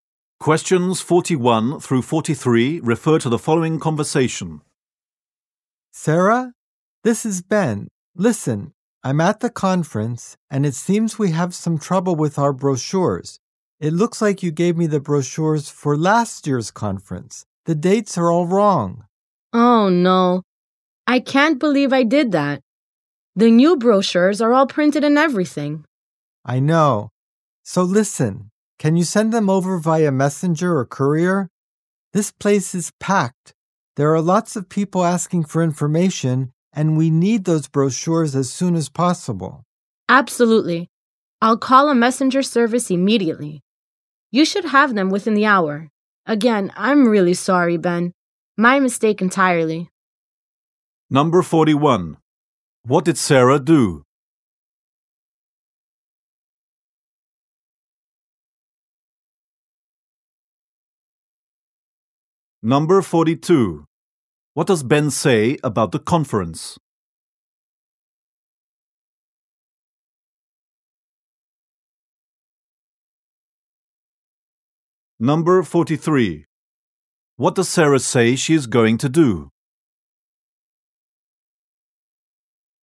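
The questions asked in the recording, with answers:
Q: What did Sarah do?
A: She gave Ben last year's brochures by mistake.

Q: What does Ben say about the conference?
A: It is very crowded, with many people asking for information.

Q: What does Sarah say she is going to do?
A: Call a messenger service to send the new brochures.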